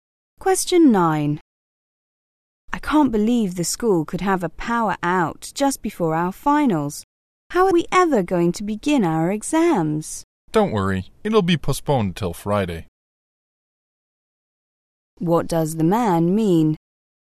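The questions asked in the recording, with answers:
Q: What does the man mean?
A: The exams will be put off until Friday.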